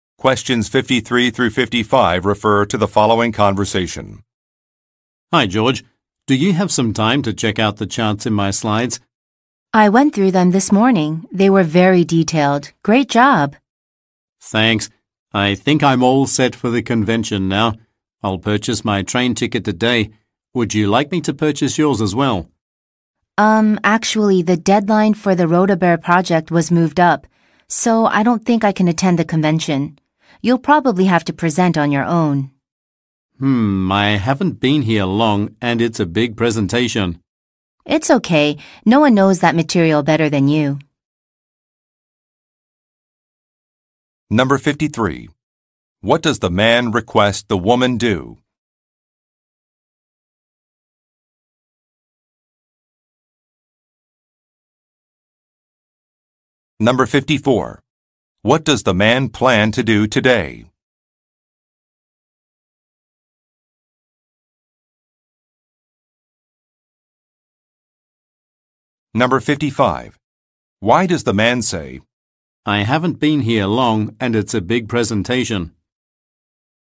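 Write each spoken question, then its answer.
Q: What does the man plan to do today?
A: Buy a train ticket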